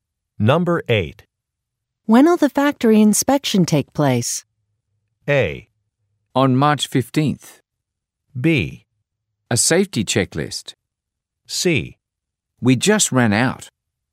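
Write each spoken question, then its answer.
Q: When'll the factory inspection take place?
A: A: On March 15th.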